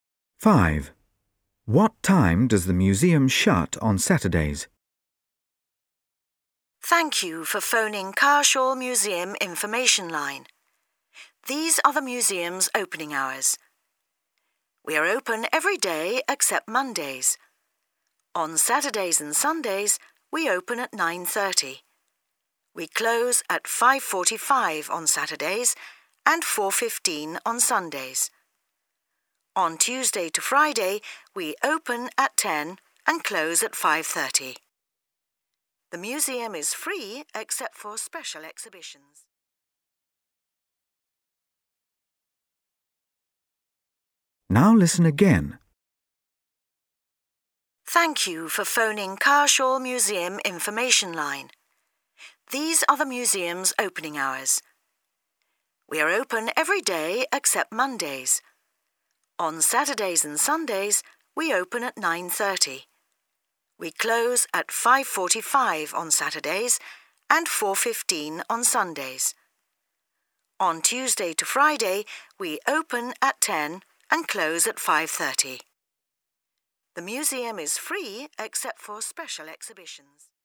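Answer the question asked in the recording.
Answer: 5:45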